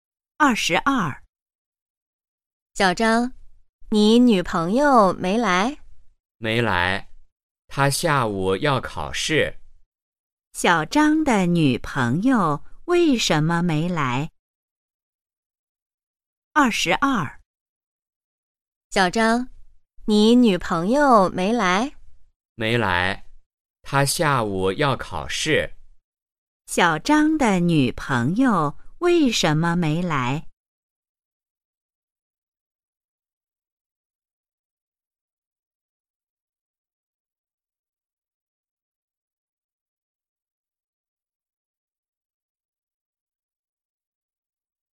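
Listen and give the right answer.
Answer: 她下午要考试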